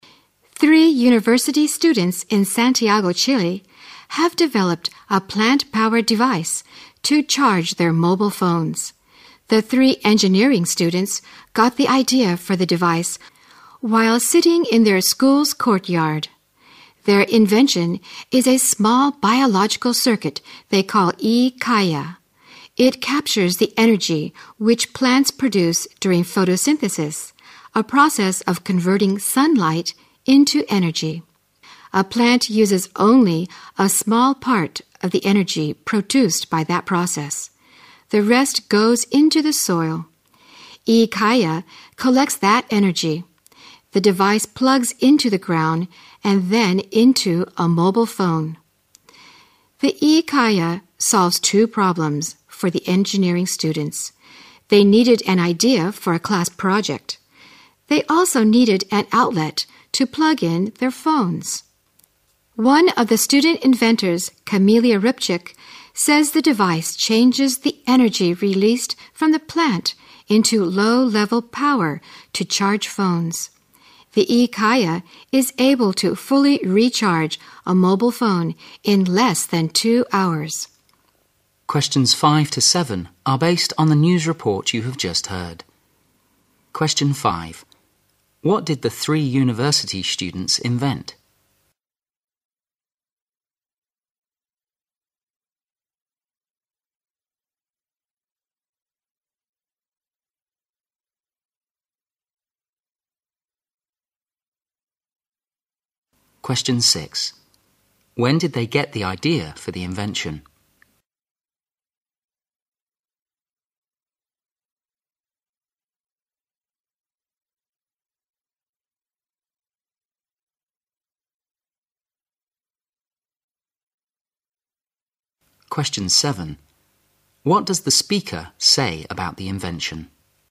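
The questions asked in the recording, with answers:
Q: What did the three university students invent?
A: A plant-powered device to charge mobile phones

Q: When did they get the idea for the invention?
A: While sitting in their school's courtyard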